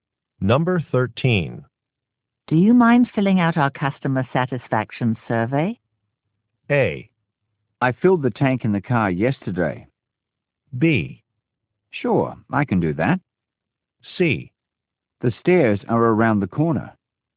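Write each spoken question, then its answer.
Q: Do you mind filling out our customer satisfaction survey?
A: B: Sure, I can do that.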